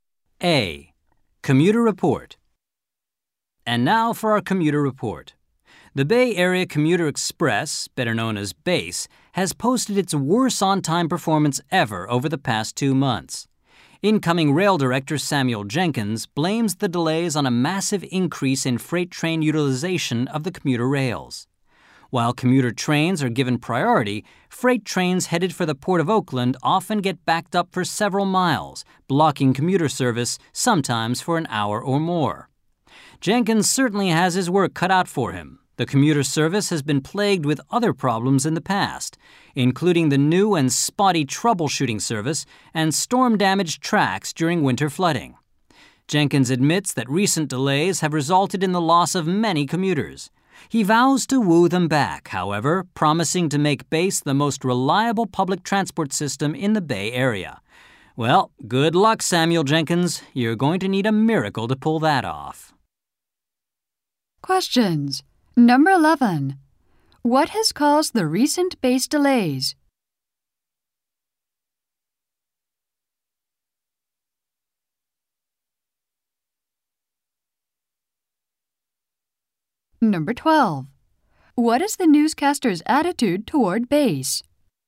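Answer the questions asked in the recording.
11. Freight trains blocking the commuter rails
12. Doubtful that it can become reliable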